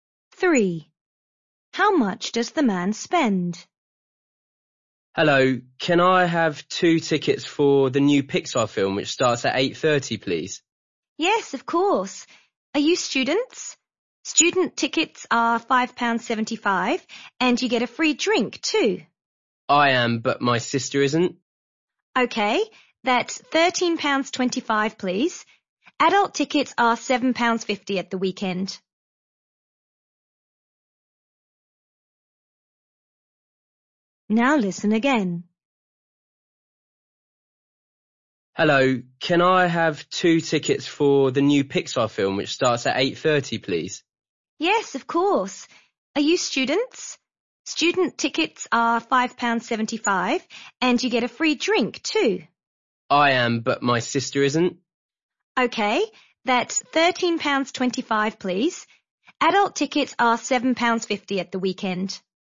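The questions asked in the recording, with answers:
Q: How much does the man spend?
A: £13.25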